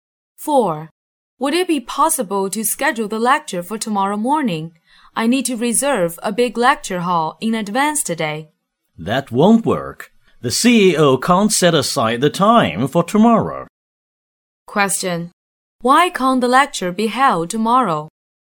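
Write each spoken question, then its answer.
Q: Why can't the lecture be held tomorrow?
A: The CEO can't make time tomorrow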